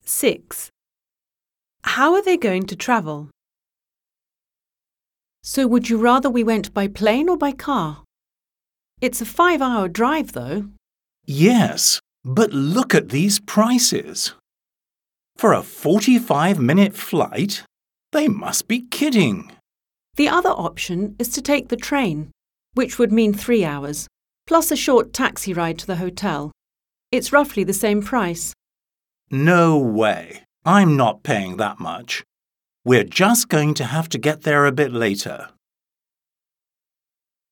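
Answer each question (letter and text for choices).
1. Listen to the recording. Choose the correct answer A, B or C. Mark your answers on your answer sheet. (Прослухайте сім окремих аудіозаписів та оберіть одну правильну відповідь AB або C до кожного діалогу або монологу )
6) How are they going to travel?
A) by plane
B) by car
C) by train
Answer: B) by car

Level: 9-Б клас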